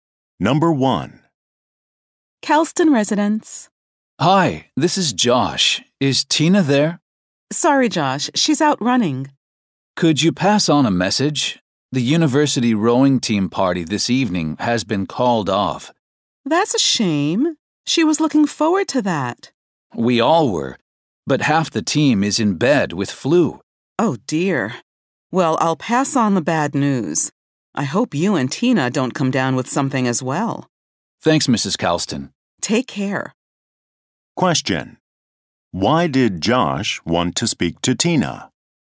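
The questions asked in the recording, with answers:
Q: Why did Josh want to speak to Tina?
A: To tell her the rowing team party was canceled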